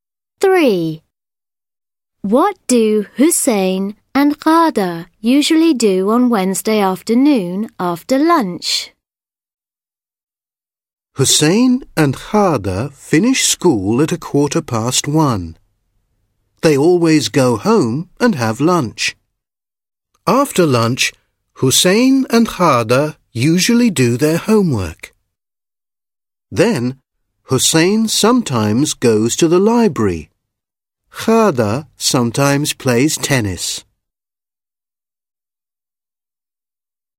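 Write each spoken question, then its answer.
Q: What do Hussein and Ghada usually do on Wednesday afternoon after lunch?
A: They do their homework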